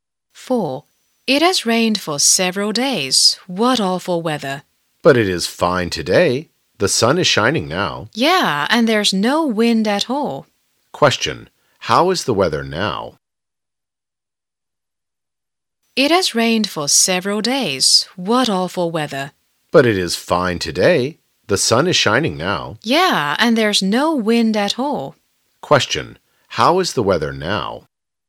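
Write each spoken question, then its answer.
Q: How is the weather now?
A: Sunny and not windy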